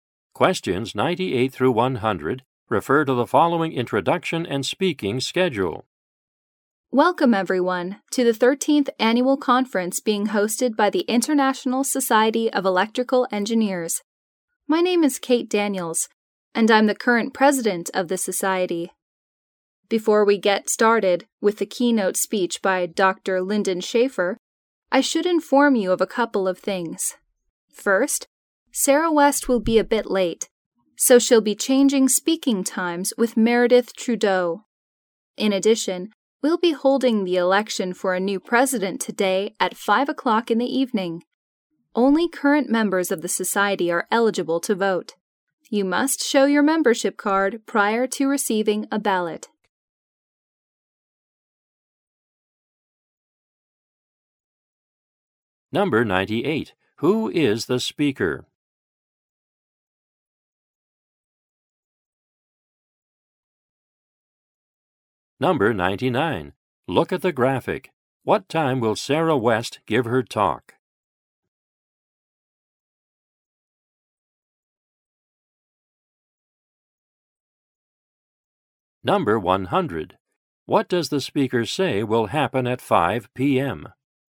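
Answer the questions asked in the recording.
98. Kate Daniels, president of the society
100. An election for a new president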